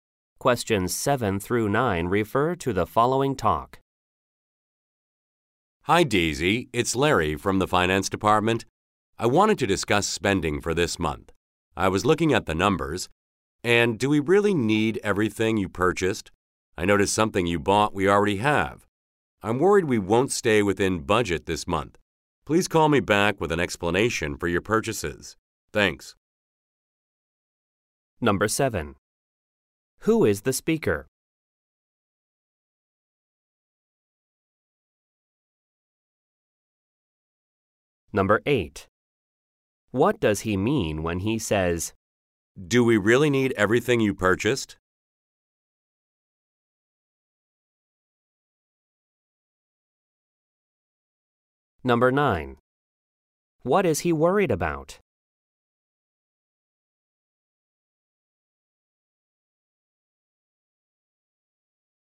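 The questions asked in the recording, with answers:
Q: Who is the speaker?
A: Larry from the finance department

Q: What does he mean when he says,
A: He thinks some of the purchases were unnecessary

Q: What is he worried about?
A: Not staying within budget this month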